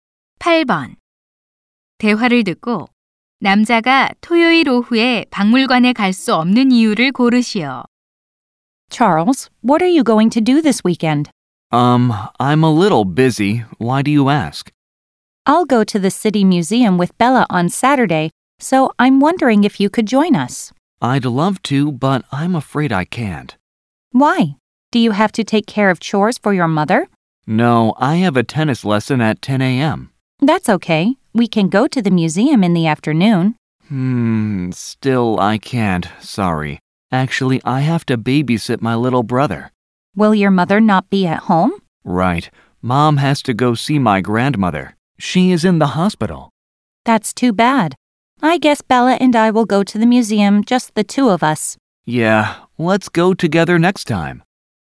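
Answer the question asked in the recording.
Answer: 남동생을 돌봐야 해서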